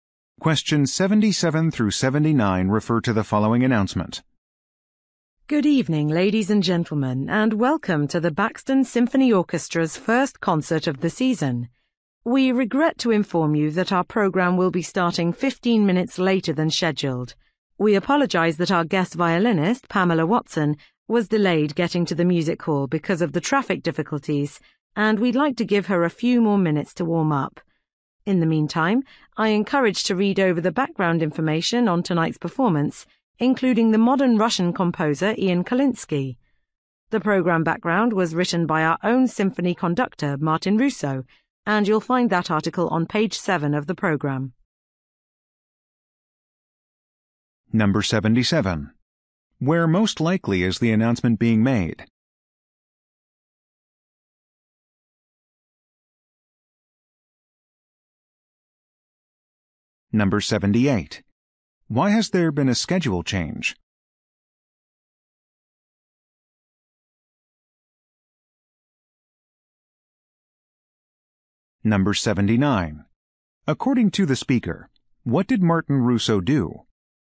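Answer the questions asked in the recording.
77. At a concert hall
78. The guest violinist was delayed by traffic
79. He wrote the program background article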